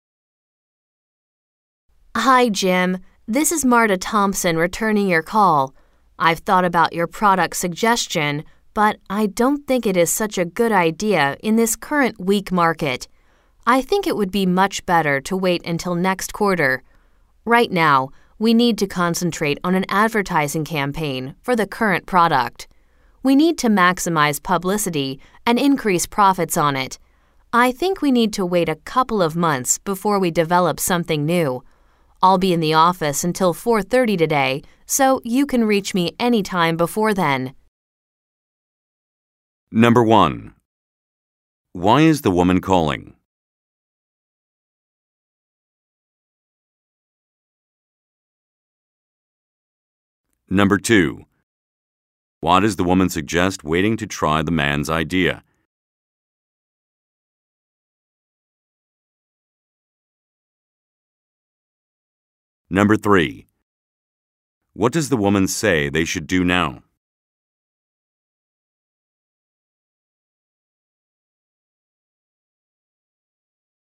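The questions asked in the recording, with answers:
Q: Why is the woman calling?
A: To return Jim's call about his product suggestion

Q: Why does the woman suggest waiting to try the man's idea?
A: Because the current market is weak

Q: What does the woman say they should do now?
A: Concentrate on an advertising campaign for the current product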